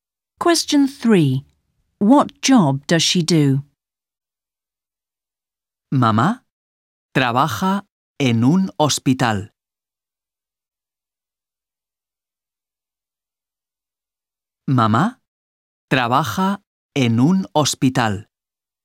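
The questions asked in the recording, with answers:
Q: What job does she do?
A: She works in a hospital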